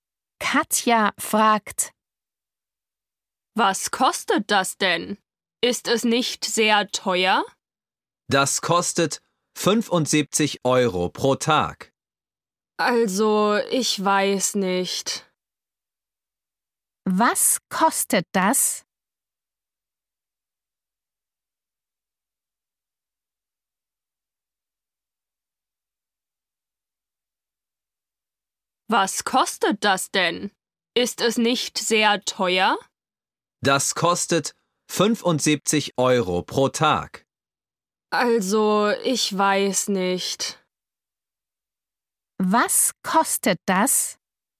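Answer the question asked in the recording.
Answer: 75 Euro pro Tag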